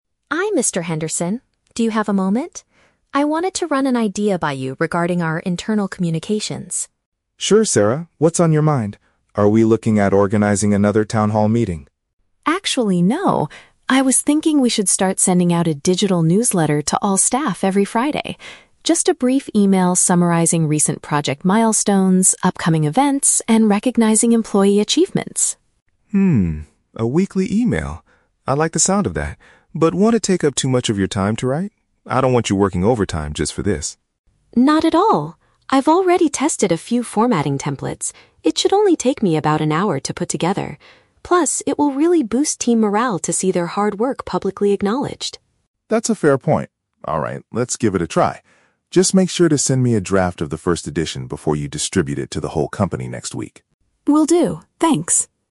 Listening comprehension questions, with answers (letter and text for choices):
Listen to a conversation between an employee and a director. Choose the correct answer (A, B, or C) for each question.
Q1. What is Sarah's main proposal?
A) To organize another large meeting for the whole company.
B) To distribute a regular email summarizing company news.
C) To create a printed magazine for the company's clients.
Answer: B) To distribute a regular email summarizing company news.

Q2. What is the director's initial concern about the idea?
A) He thinks the employee might have to work extra hours.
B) He worries that the staff will not bother reading the emails.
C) He believes the design templates are too expensive to buy.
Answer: A) He thinks the employee might have to work extra hours.

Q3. What does Mr. Henderson ask Sarah to do next?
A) Ask the other employees for their opinions on the idea.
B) Distribute the very first newsletter this coming Friday afternoon.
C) Show him a preliminary version before sharing it with everyone.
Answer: C) Show him a preliminary version before sharing it with everyone.

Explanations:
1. Sarah suggests sending out a "digital newsletter... every Friday" (regular email) that summarizes "project milestones, upcoming events" (company news). Option A is the Trap: Mr. Henderson asks if she wants to organize another "town hall meeting", but she says "Actually, no." Option C is plausible in a media department but is never mentioned.
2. Mr. Henderson asks if it will take up too much time and says, "I don't want you working overtime." Option A paraphrases "working overtime" as "work extra hours". Option C is the Trap: Sarah mentions testing "templates", but they are not talking about the cost. Option B is a realistic concern for managers, but it is not mentioned in the audio.
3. Mr. Henderson tells Sarah to "send me a draft... before you distribute it". Option C perfectly paraphrases this (draft = preliminary version; distribute it to the whole company = share it with everyone). Option B is the Trap: "Friday" and "distribute" are mentioned in the audio, but the newsletter will be distributed "next week", not this Friday afternoon. Option A is not mentioned.

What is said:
Sarah: Hi Mr. Henderson. Do you have a moment? I wanted to run an idea by you regarding our internal communications.
Mr. Henderson: Sure, Sarah. What's on your mind? Are we looking at organizing another town hall meeting?
Sarah: Actually, no. I was thinking we should start sending out a digital newsletter to all staff every Friday. Just a brief email summarizing recent project milestones, upcoming events, and recognizing employee achievements.
Mr. Henderson: Hmm, a weekly email. I like the sound of that, but won't it take up too much of your time to write? I don't want you working overtime just for this.
Sarah: Not at all! I've already tested a few formatting templates. It should only take me about an hour to put together. Plus, it will really boost team morale to see their hard work publicly acknowledged.
Mr. Henderson: That's a fair point. Alright, let's give it a try. Just make sure to send me a draft of the first edition before you distribute it to the whole company next week.